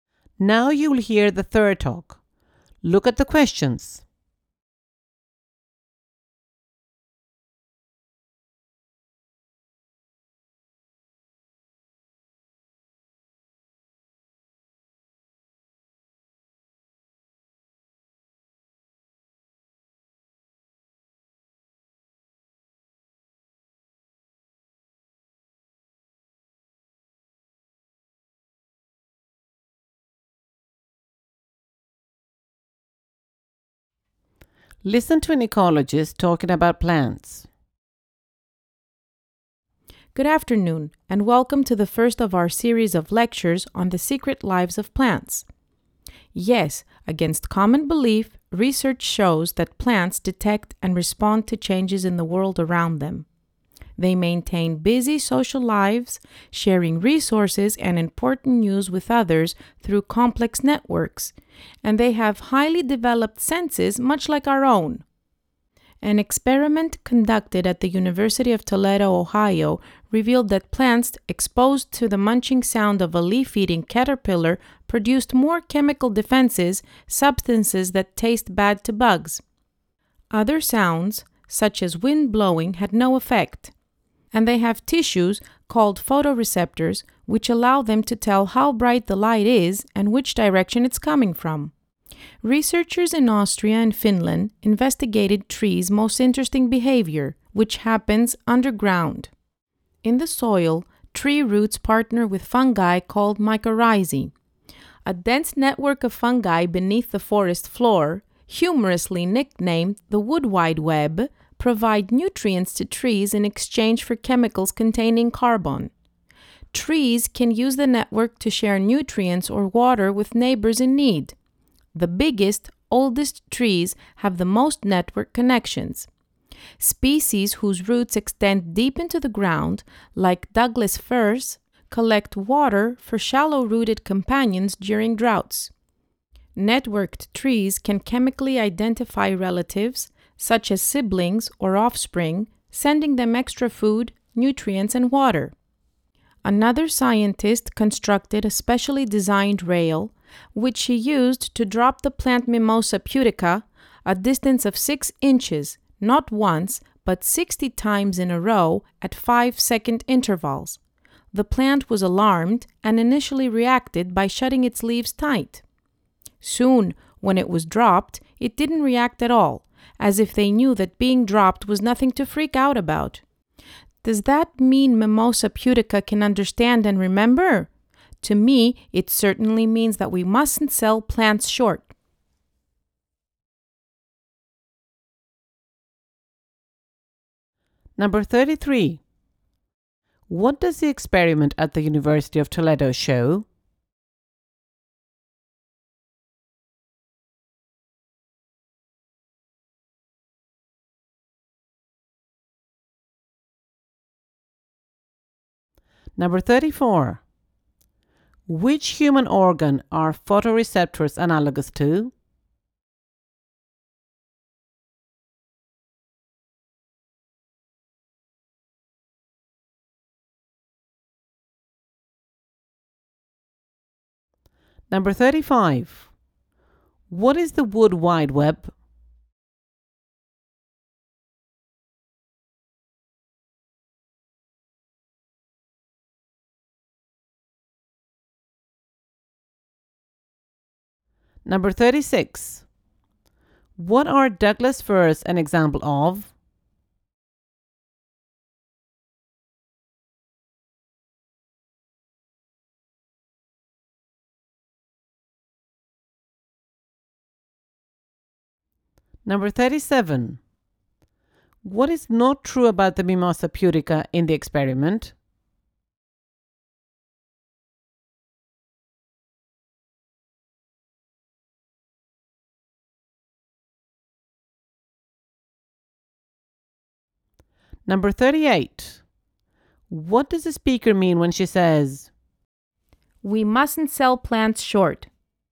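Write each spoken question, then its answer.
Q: What does the experiment at the University of Toledo show?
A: Plants react to the sound of predators by producing chemical defenses

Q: Which human organ are photoreceptors analogous to?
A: The eyes

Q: What is the wood wide web?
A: An underground network of fungi that links trees and supplies nutrients

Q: What are Douglas firs an example of?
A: Deep-rooted trees that collect water for shallow-rooted neighbors during droughts

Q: What does the speaker mean when she says,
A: We shouldn't underestimate plants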